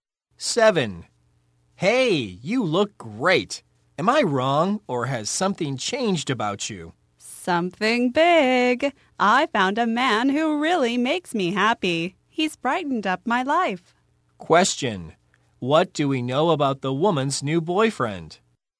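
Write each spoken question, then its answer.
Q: What do we know about the woman's new boyfriend?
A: He makes her really happy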